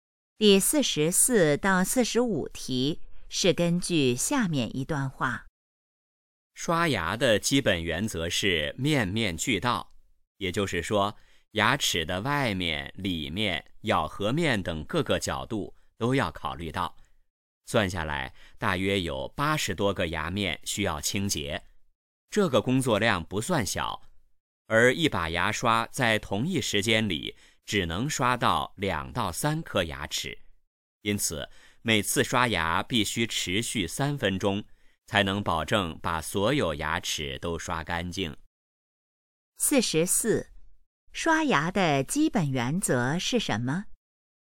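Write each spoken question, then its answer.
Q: 刷牙的基本原则是什么?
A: 面面俱到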